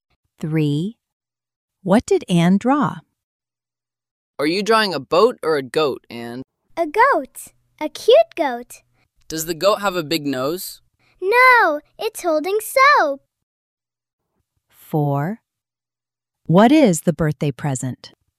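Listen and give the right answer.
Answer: A goat holding soap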